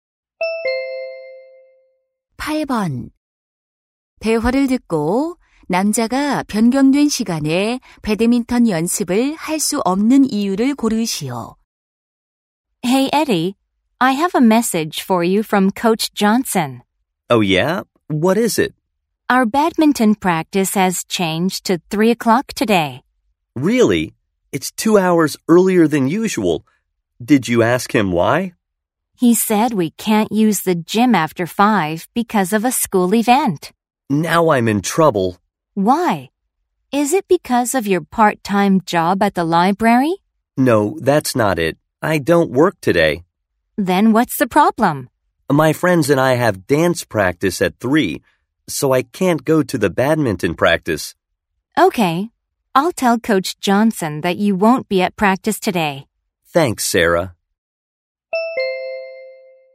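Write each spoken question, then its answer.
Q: 대화를 듣고 남자가 변경된 시간에 배드민턴 연습을 할 수 없는 이유를 고르시오.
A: 친구들과 댄스 연습이 있어서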